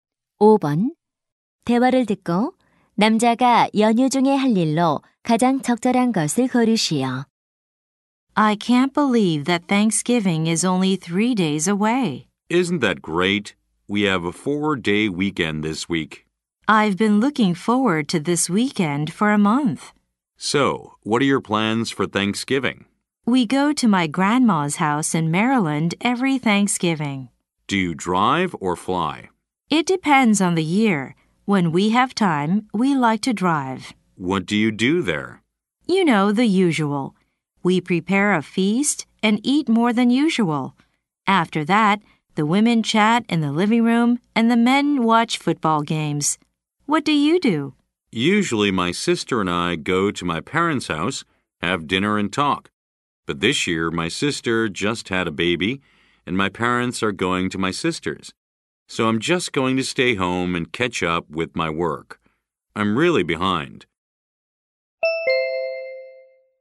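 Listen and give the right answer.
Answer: 집에 머물며 밀린 일하기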